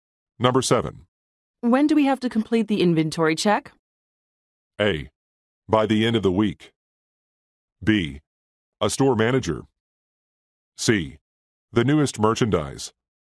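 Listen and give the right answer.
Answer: A: By the end of the week.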